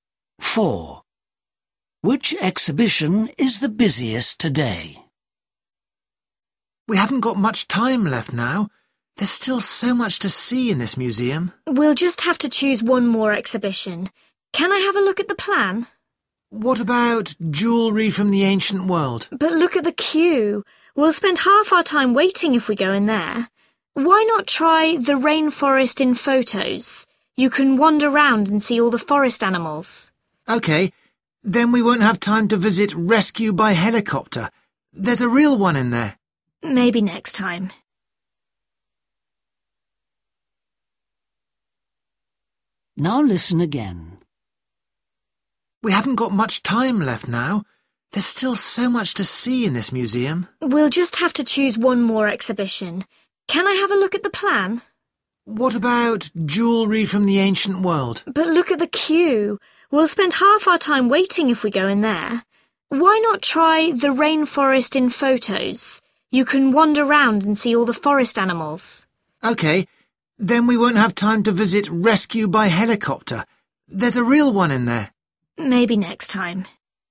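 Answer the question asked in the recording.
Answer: the jewellery from the ancient world exhibition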